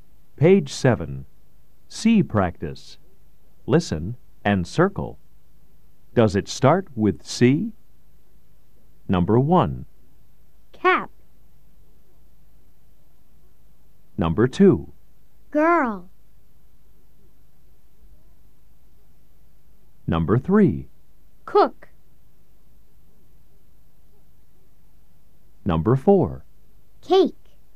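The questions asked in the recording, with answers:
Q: Does it start with C?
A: Yes (cap)

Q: Does it start with C?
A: No (girl)

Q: Does it start with C?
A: Yes (cook)

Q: Does it start with C?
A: Yes (cake)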